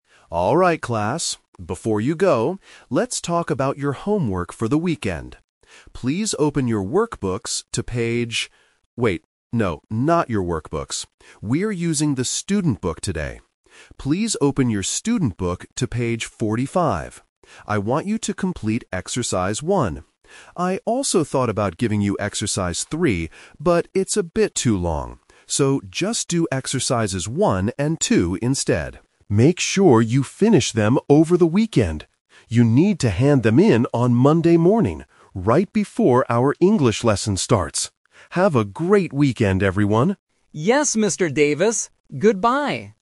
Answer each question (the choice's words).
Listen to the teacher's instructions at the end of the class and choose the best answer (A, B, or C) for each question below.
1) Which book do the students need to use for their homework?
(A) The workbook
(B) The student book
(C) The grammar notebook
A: The student book

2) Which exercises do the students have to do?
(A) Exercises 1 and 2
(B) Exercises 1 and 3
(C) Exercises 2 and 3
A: Exercises 1 and 2

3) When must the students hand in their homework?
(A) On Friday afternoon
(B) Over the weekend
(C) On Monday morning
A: On Monday morning

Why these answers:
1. The teacher corrects himself and says, "We are using the student book today. Please open your student book..."
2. The teacher gives the final instruction: "...just do exercises 1 and 2 instead."
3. The teacher clearly states, "You need to hand them in on Monday morning..."

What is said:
Teacher: Alright class, before you go, let's talk about your homework for the weekend. Please open your workbooks to page... wait, no, not your workbooks. We are using the student book today. Please open your student book to page 45. I want you to complete exercise 1. I also thought about giving you exercise 3, but it's a bit too long. So, just do exercises 1 and 2 instead. Make sure you finish them over the weekend. You need to hand them in on Monday morning, right before our English lesson starts.